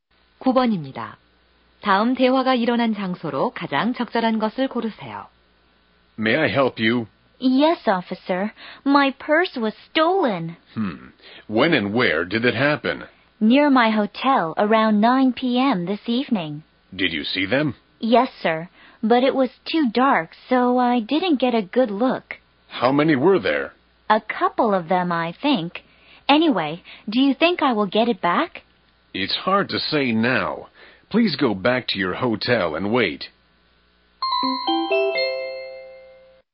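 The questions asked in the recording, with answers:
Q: 다음 대화가 일어난 장소로 가장 적절한 것을 고르세요.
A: 경찰서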